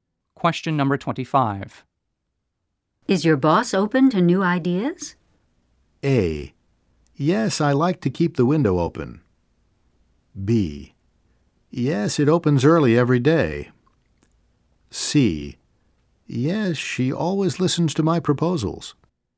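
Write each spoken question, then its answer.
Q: Is your boss open to new ideas?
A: C: Yes, she always listens to my proposals.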